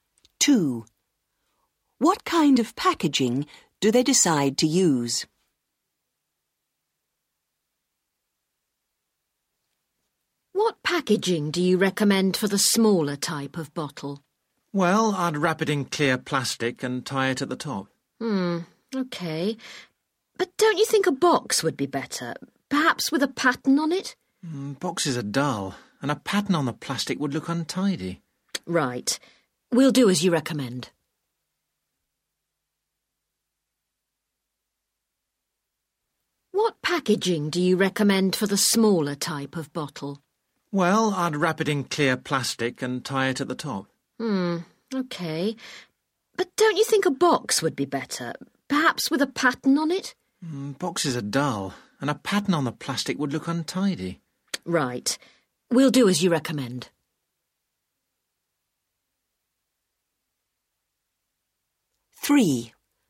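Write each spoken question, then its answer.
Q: What kind of packaging do they decide to use?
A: clear plastic tied at the top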